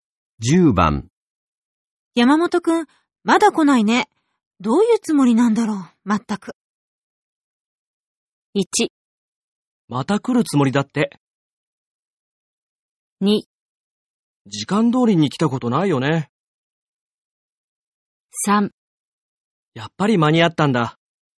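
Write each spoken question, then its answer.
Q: 山本くん、まだ来ないね。どういうつもりなんだろう、まったく。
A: 2: 時間通りに来たことないよね。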